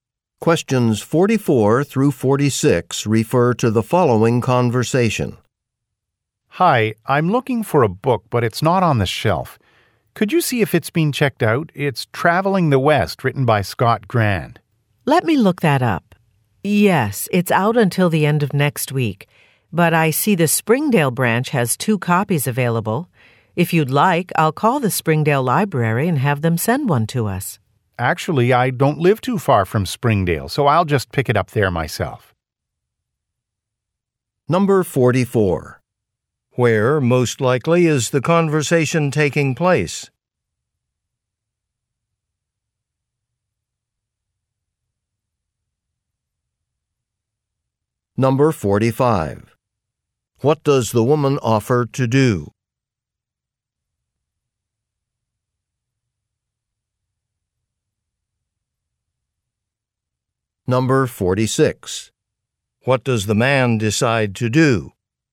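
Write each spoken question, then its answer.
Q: Where, most likely, is the conversation taking place?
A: At a library

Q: What does the woman offer to do?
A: Call the Springdale Library to have a copy sent

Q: What does the man decide to do?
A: Pick up the book at the Springdale branch himself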